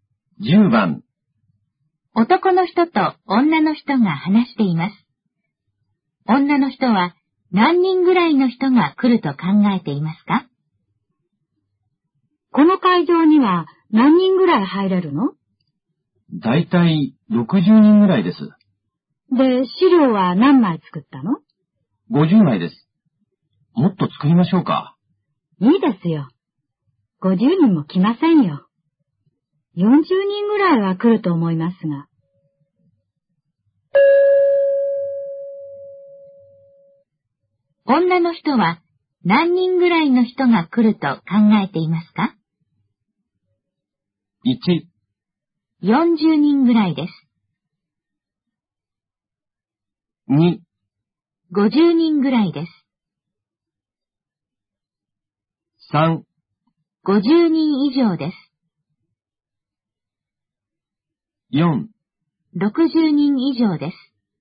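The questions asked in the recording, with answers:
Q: 女の人は何人ぐらいの人が来ると考えていますか?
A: 1: 40人ぐらいです。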